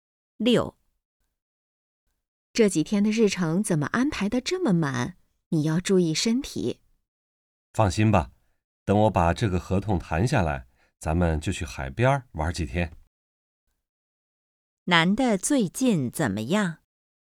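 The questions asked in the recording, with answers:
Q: 男的最近怎么样?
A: 工作很忙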